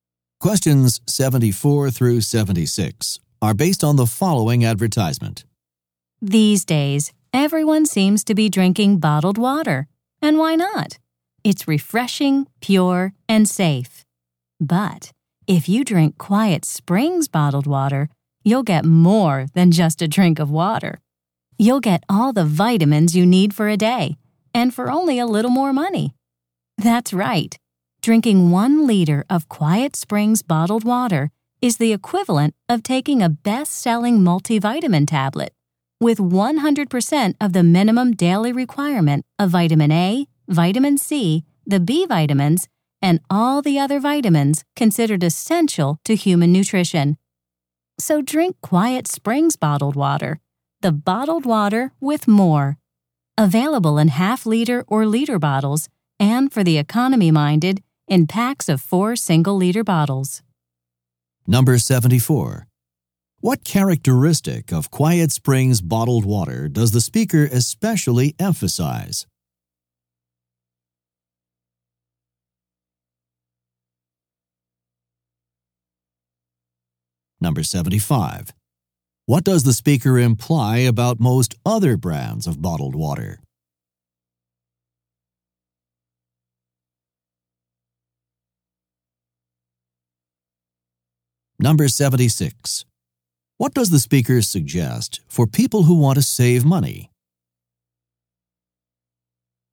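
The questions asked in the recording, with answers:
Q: What characteristic of Quiet Springs bottled water does the speaker especially emphasize?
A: It contains all the vitamins you need for a day

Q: What does the speaker imply about most other brands of bottled water?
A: They do not contain vitamins

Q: What does the speaker suggest for people who want to save money?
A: Buy packs of 4 single-liter bottles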